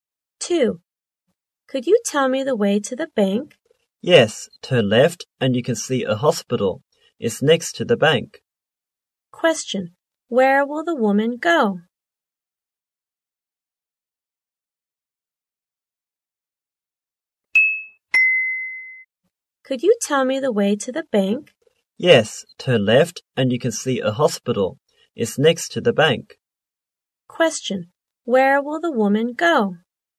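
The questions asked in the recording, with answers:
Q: Question, where will the woman go?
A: To the bank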